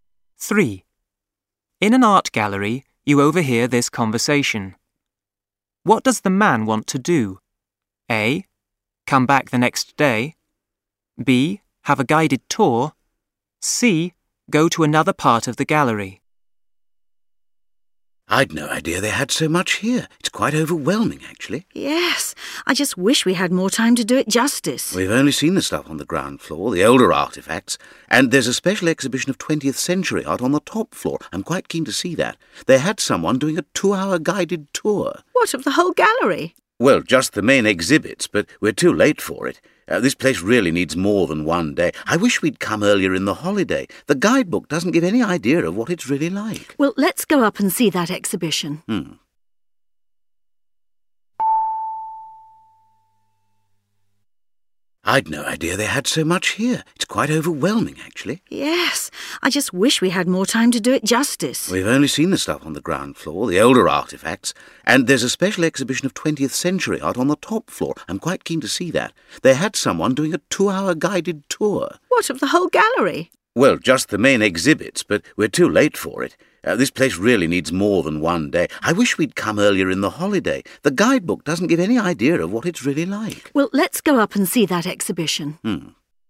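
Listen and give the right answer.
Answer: C: Go to another part of the gallery.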